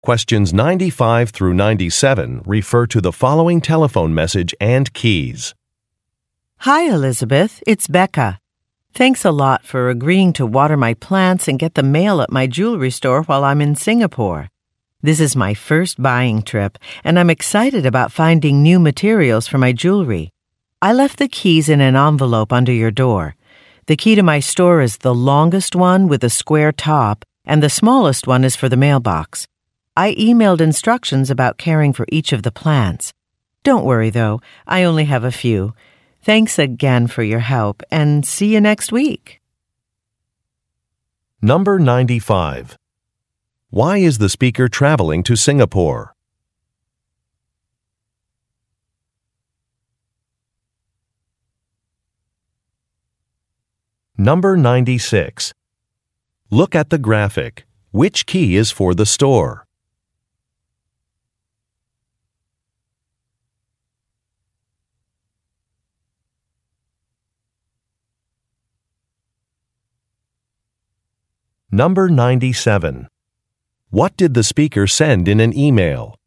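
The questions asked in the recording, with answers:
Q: Why is the speaker traveling to Singapore?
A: To buy new materials for her jewelry

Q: What did the speaker send in an email?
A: Instructions about caring for the plants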